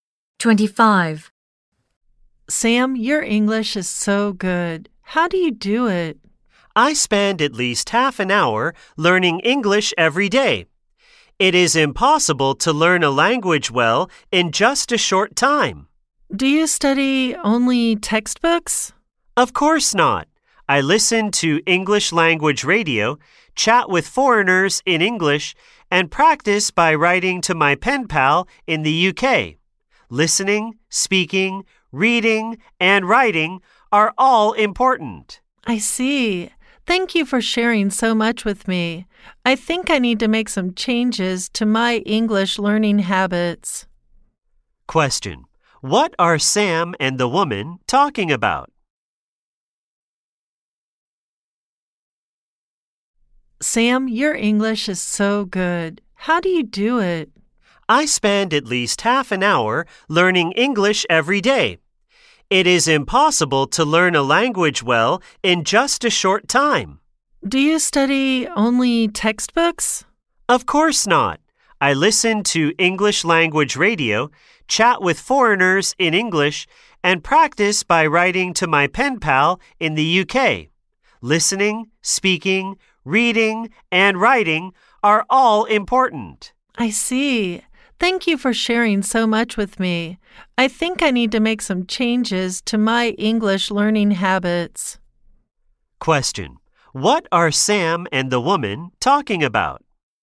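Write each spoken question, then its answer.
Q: Question: What are Sam and the woman talking about?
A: How to learn English well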